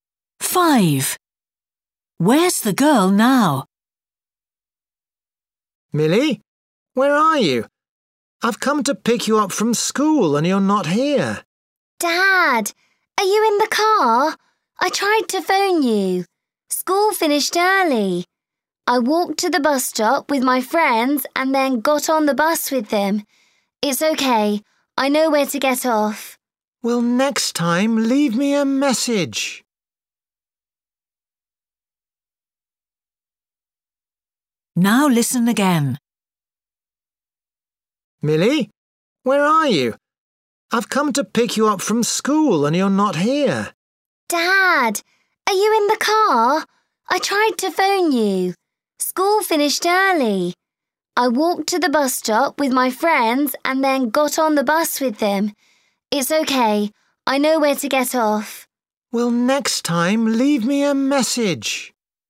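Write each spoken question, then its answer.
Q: Where's the girl now?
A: On the bus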